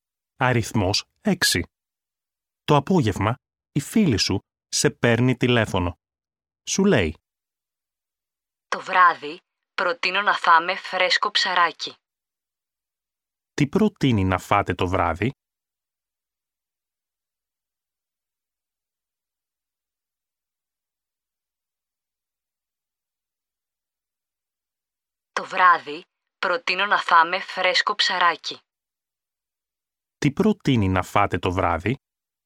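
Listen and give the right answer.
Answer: Φρέσκο ψαράκι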